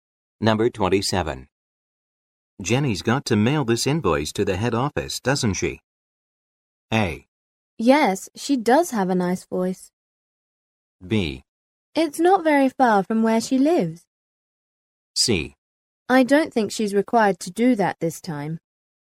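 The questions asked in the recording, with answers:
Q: Jenny's got to mail this invoice to the head office, doesn't she?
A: C: I don't think she's required to do that this time.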